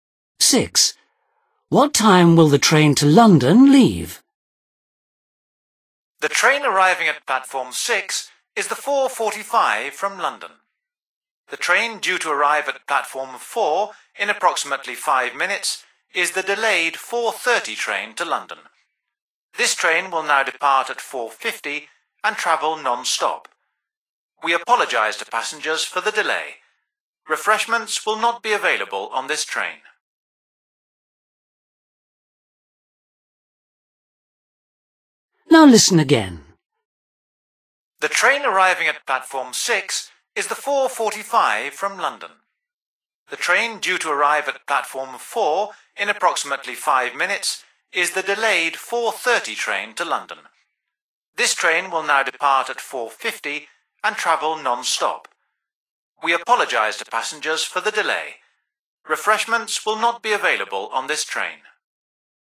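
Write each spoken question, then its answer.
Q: What time will the train to London leave?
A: 4:50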